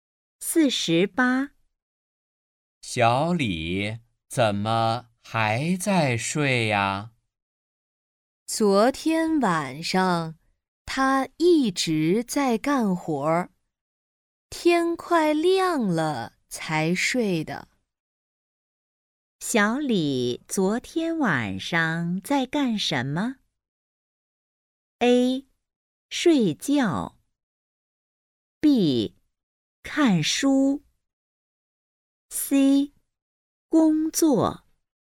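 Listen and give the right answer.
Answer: C: 工作。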